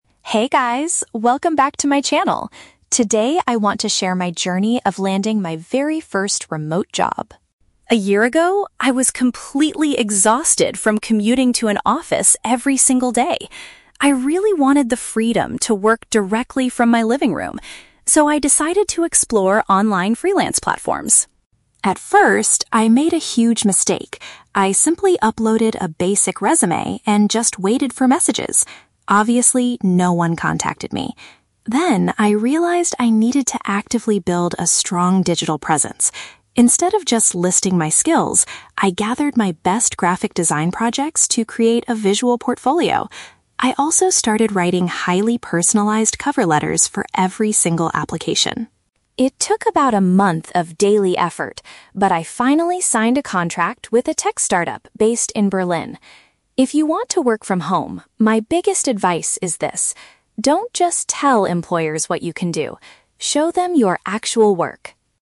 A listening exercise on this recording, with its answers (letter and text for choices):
Listen to a vlogger talking about her experience finding a remote job and choose the correct answer (A, B, or C) for each question.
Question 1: Why did the vlogger decide to look for a remote job?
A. She wanted to travel around the world as a digital nomad.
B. She disliked the daily journey to a traditional workplace.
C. She was forced to leave her previous graphic design company.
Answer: B. She disliked the daily journey to a traditional workplace.

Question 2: What mistake did she make at the beginning of her search?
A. She only applied for roles at tech startups in Berlin.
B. She sent the exact same cover letter to multiple employers.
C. She just posted her CV online without taking further action.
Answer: C. She just posted her CV online without taking further action.

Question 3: According to the vlogger, what is the most effective way to get hired?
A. Provide visual examples of your past professional projects.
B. Explain your communication skills thoroughly in a personalized letter.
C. Offer to do the first graphic design task for the client for free.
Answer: A. Provide visual examples of your past professional projects.

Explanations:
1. Emma says she was "exhausted from commuting to an office every single day". Option (B) correctly paraphrases this (commuting = daily journey; office = traditional workplace). Option (A) is a plausible reason for remote work, but she explicitly says she wanted to work from her "living room", not travel the world. Option (C) is not mentioned.
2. Emma admits her mistake was that she "simply uploaded a basic resume and just waited for messages". Option (C) uses synonyms to describe this passive behavior (uploaded a resume = posted her CV online; just waited = without taking further action). Option (A) is The Trap: "Tech startup in Berlin" is mentioned at the end as her success, not her initial mistake. Option (B) is incorrect because she mentions writing personalized cover letters later as a good thing, not a mistake.
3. Her biggest advice at the end is "don't just tell employers what you can do, show them your actual work!" and earlier she mentions creating a "visual portfolio" from her projects. Option (A) perfectly matches this idea. Option (B) is The Trap: She does talk about "personalized cover letters", but her biggest advice is to show work, not just explain skills in a letter ("don't just tell employers..."). Option (C) is never mentioned.

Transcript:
Emma: Hey guys, welcome back to my channel! Today, I want to share my journey of landing my very first remote job.
A year ago, I was completely exhausted from commuting to an office every single day. I really wanted the freedom to work directly from my living room. So, I decided to explore online freelance platforms.
At first, I made a huge mistake. I simply uploaded a basic resume and just waited for messages. Obviously, no one contacted me. Then, I realized I needed to actively build a strong digital presence. Instead of just listing my skills, I gathered my best graphic design projects to create a visual portfolio. I also started writing highly personalized cover letters for every single application.
It took about a month of daily effort, but I finally signed a contract with a tech startup based in Berlin.